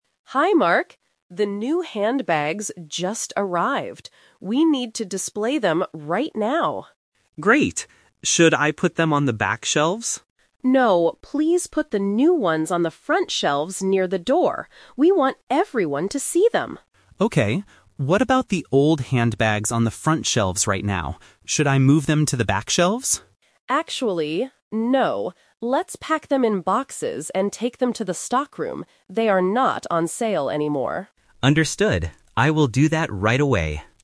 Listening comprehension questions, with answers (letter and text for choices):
Listen to the conversation and choose the correct answer (A, B, or C) for each question.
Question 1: Where should Mark put the NEW handbags?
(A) In the stockroom.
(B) On the back shelves.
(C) On the front shelves.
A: (C) On the front shelves.

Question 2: Why does the leader want the new bags near the door?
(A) So that customers can see them.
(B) Because they are very heavy.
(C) Because there is no space on the back shelves.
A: (A) So that customers can see them.

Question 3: What will happen to the OLD handbags?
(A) They will stay on the front shelves.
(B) They will be moved to the back shelves.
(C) They will be taken to the stockroom.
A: (C) They will be taken to the stockroom.

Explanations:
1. The leader clearly tells Mark, "please put the new ones on the front shelves near the door." Why the trap is wrong: Option (B) is a trap because Mark asks if he should put them on the back shelves, but the leader says "No". Option (A) is the destination for the old bags.
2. After telling Mark to put the new bags near the door, the leader explains, "We want everyone to see them." Why the trap is wrong: Options (B) and (C) might be logical reasons in a real-life store, but the speakers never mention the weight of the bags or the space on the shelves.
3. This is "The Twist". Mark asks if he should move the old bags to the back shelves, but the leader corrects him: "Let's pack them in boxes and take them to the stockroom." Why the trap is wrong: Option (B) is the trap based on Mark's suggestion which was rejected. Option (A) is where the old bags are right now, not where they are going.

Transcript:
Leader: Hi Mark, the new handbags just arrived. We need to display them right now.
Mark: Great. Should I put them on the back shelves?
Leader: No, please put the new ones on the front shelves near the door. We want everyone to see them.
Mark: Okay. What about the old handbags on the front shelves right now? Should I move them to the back shelves?
Leader: Actually, no. Let's pack them in boxes and take them to the stockroom.